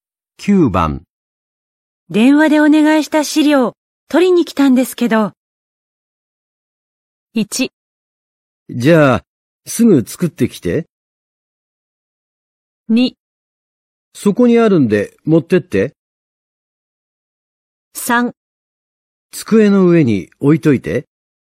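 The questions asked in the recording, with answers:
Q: 電話でお願いした資料、取りに来たんですけど。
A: 2: そこにあるんで、持ってって。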